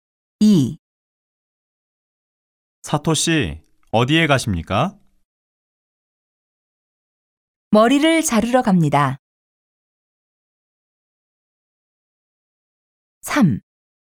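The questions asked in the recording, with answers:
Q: 사토 씨, 어디에 가십니까?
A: 미용실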